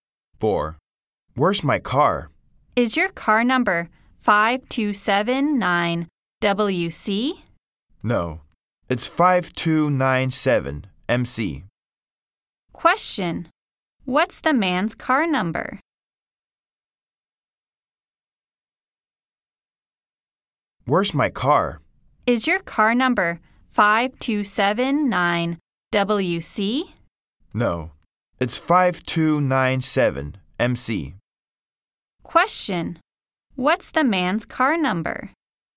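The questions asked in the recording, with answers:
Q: Question, what's the man's car number?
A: 5297MC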